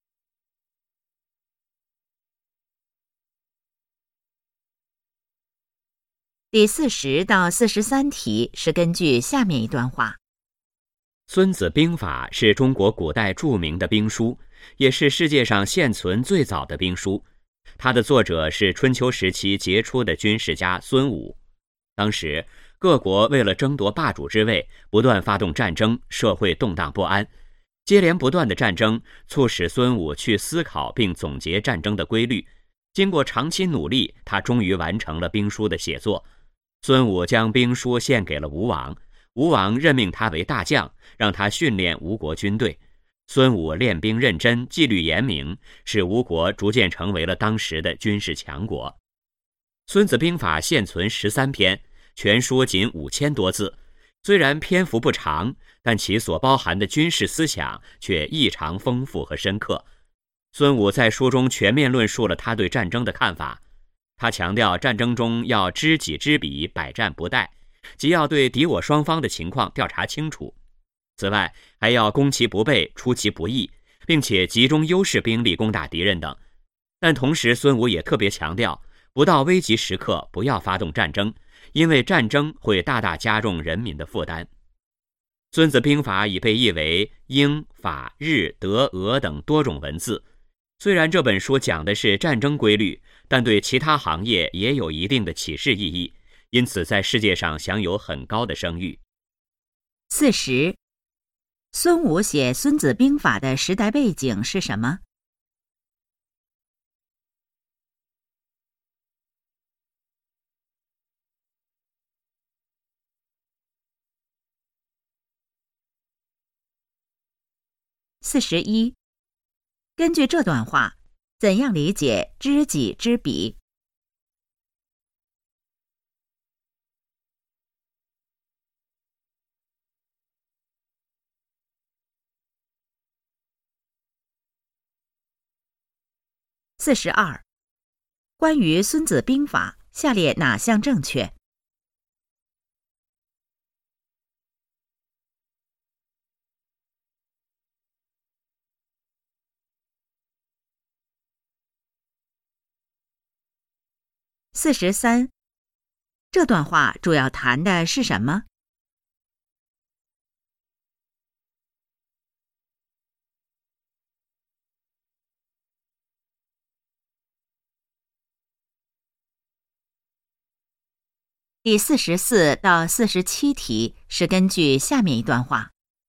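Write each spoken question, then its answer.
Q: 孙武写《孙子兵法》的时代背景是什么?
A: 各国争霸,战争不断,社会动荡不安

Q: 根据这段话,怎样理解知己知彼?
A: 对敌我双方的情况调查清楚

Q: 这段话主要谈的是什么?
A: 《孙子兵法》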